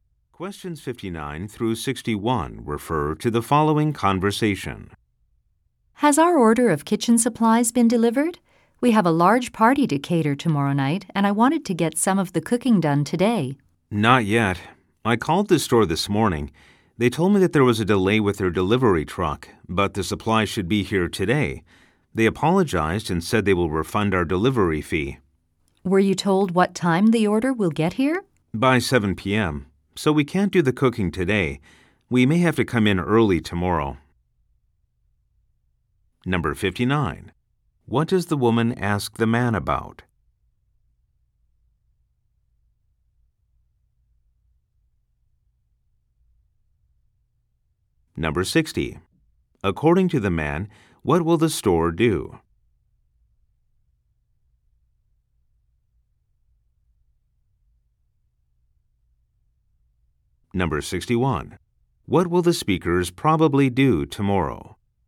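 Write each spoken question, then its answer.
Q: What does the woman ask the man about?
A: Whether the kitchen supplies order was delivered

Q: According to the man, what will the store do?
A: Refund the delivery fee

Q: What will the speakers probably do tomorrow?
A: Come in to work early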